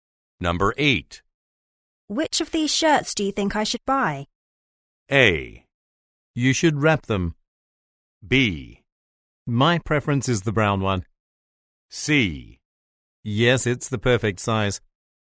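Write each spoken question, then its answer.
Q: Which of these shirts do you think I should buy?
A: B: My preference is the brown one.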